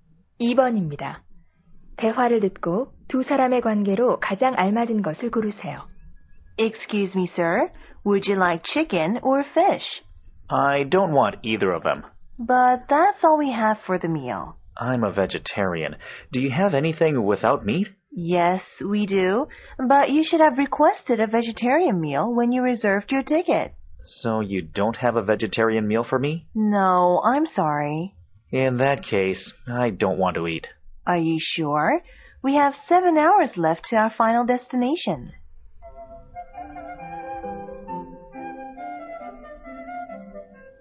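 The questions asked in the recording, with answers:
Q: 대화를 듣고 두 사람의 관계로 가장 알맞은 것을 고르세요.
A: 승무원과 승객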